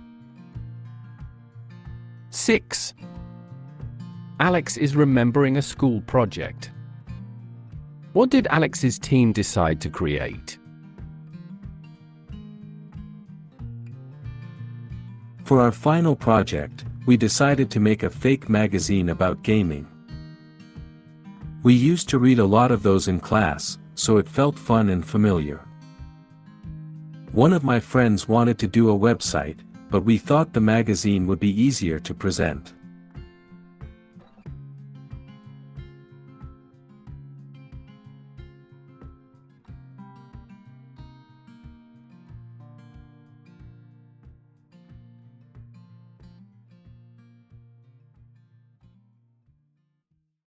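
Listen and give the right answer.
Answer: a fake magazine about gaming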